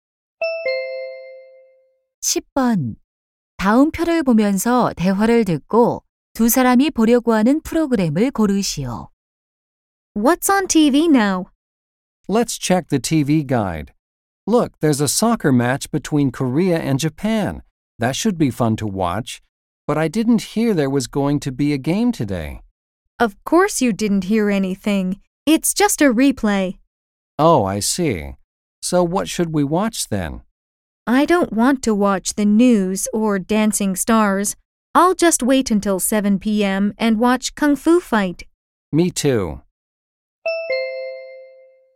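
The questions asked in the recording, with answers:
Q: 다음 표를 보면서 대화를 듣고 두 사람이 보려고 하는 프로그램을 고르시오.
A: Kung Fu Fight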